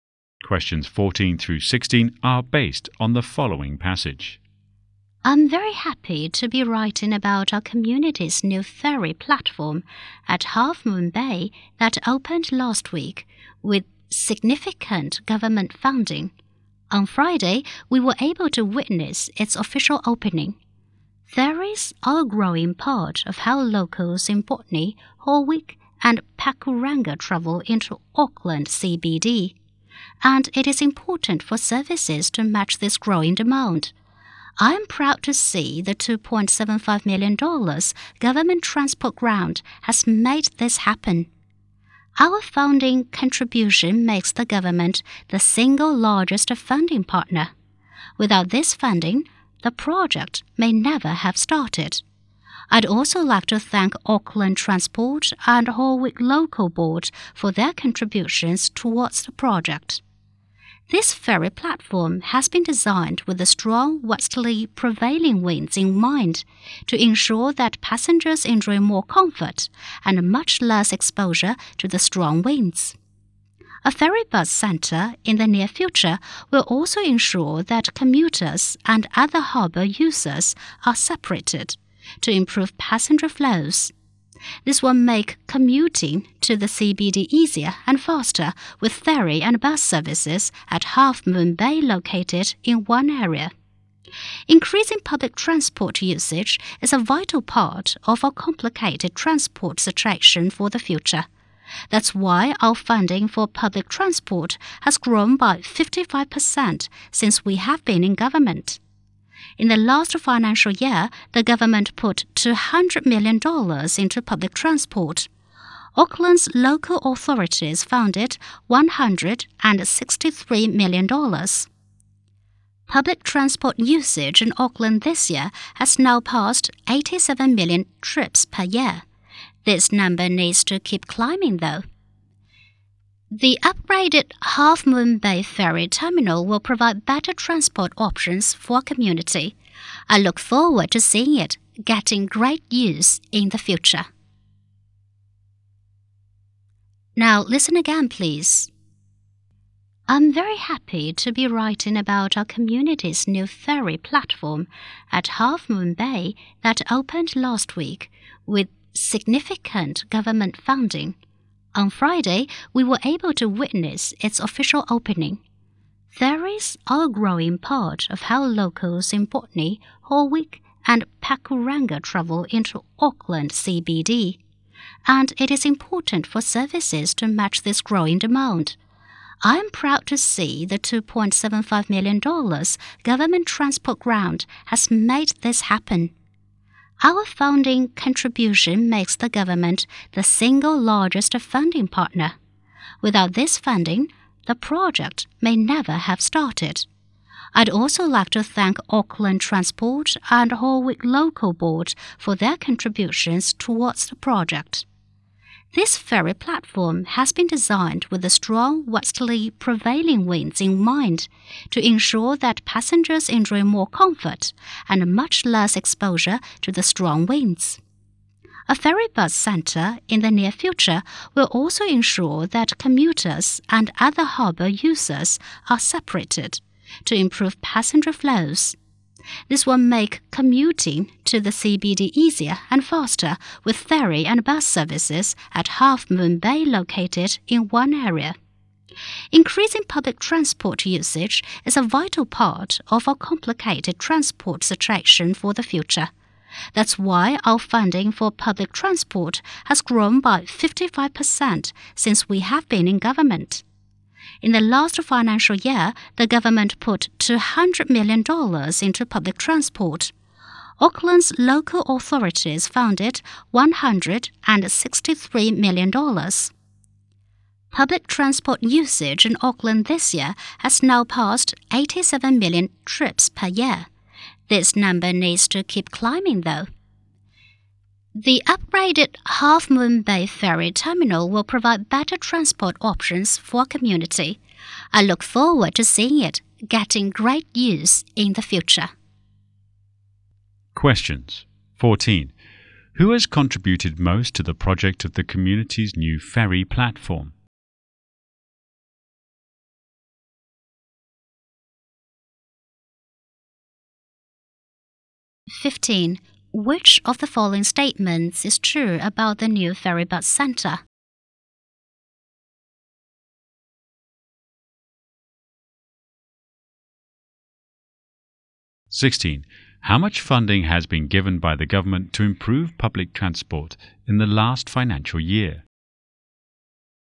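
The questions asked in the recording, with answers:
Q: Who has contributed most to the project of the community's new ferry platform?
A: The government

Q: How much funding has been given by the government to improve public transport in the last financial year?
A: $200 million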